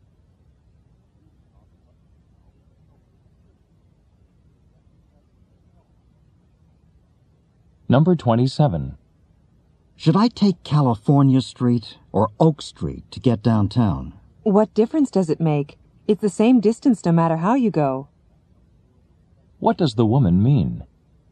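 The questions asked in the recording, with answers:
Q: What does the woman mean?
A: Either street is fine; the distance is the same.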